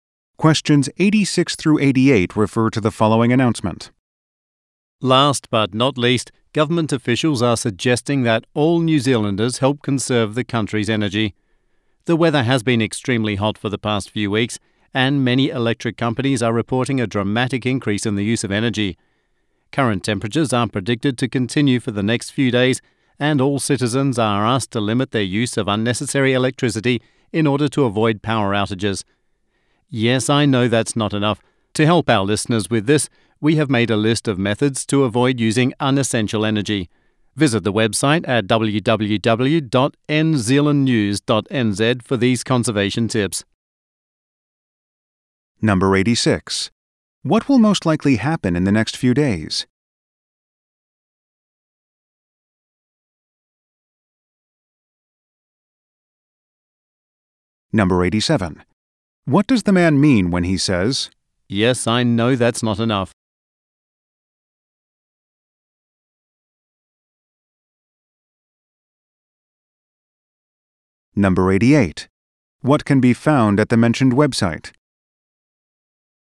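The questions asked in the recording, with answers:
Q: What will most likely happen in the next few days?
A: The hot weather will continue

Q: What can be found at the mentioned website?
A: Energy conservation tips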